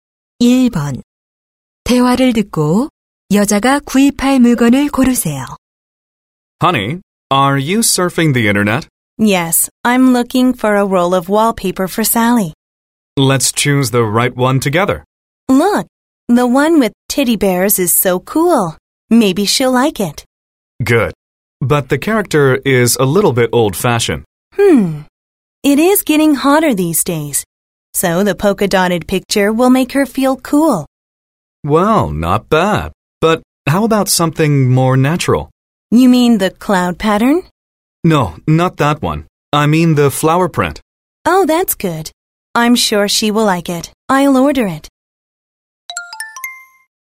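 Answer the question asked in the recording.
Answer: 꽃무늬 벽지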